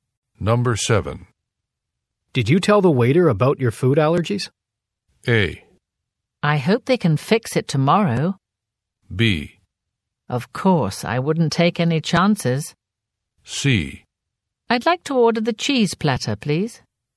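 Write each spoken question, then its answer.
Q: Did you tell the waiter about your food allergies?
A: B: Of course, I wouldn't take any chances.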